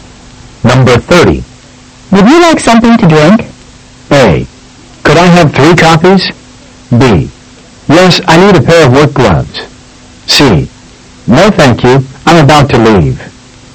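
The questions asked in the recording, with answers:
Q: Would you like something to drink?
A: C: No, thank you. I'm about to leave.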